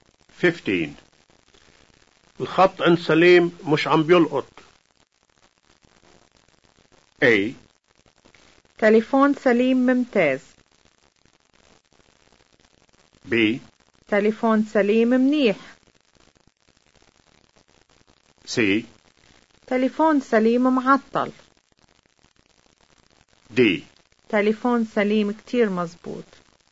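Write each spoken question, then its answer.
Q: الخط عند سليم مش عم بيلقط.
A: C: تليفون سليم معطل.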